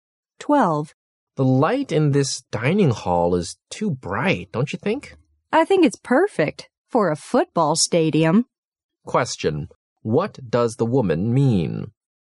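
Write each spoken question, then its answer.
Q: what does the woman mean?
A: The light is too bright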